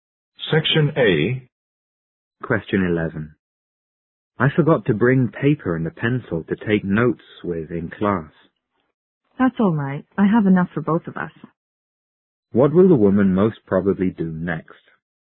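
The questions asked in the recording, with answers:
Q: What will the woman most probably do next?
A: Share her paper and pencil with the man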